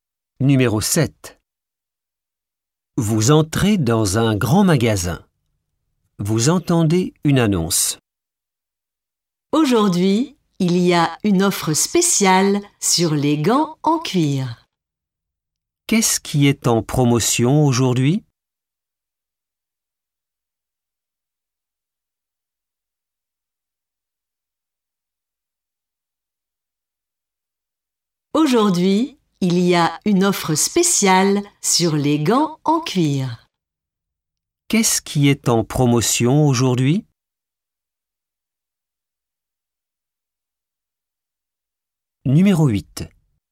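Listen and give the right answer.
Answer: Les gants en cuir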